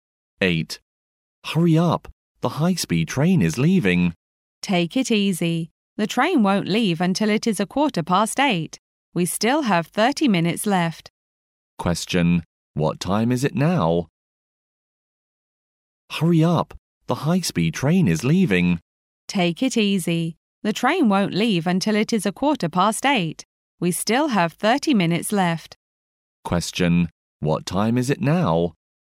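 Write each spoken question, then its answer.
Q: Question. What time is it now?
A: 7:45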